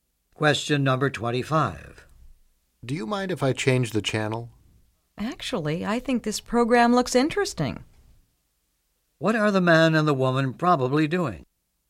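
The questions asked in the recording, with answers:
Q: What are the man and the woman probably doing?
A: Watching television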